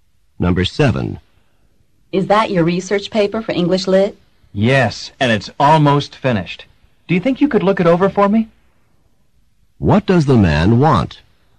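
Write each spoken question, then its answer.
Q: What does the man want?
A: He wants the woman to review his paper.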